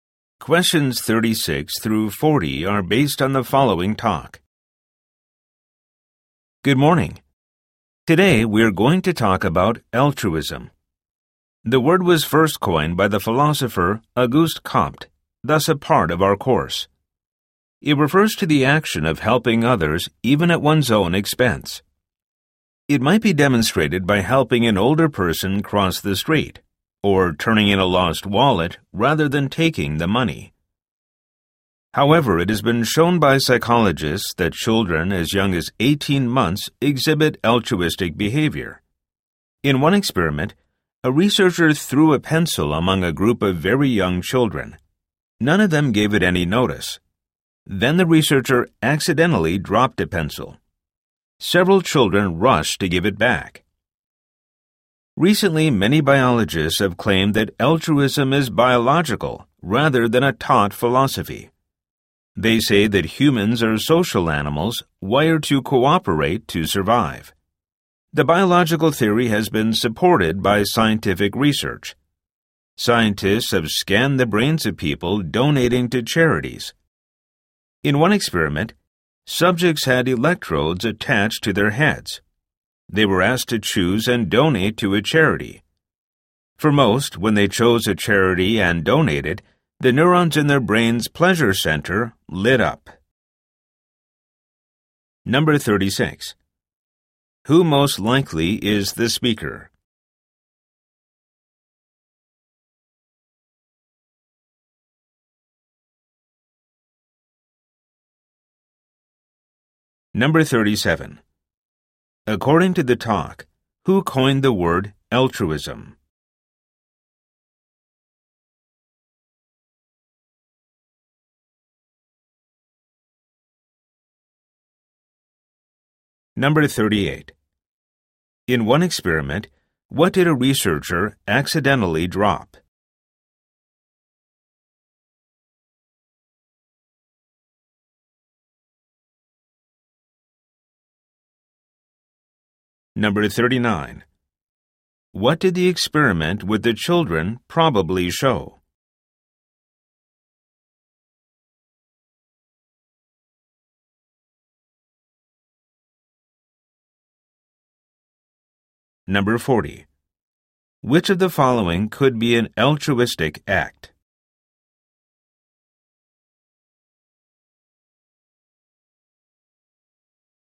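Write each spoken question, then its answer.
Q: According to the talk, who coined the word altruism?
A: The philosopher Auguste Comte

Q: In one experiment, what did a researcher accidentally drop?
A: A pencil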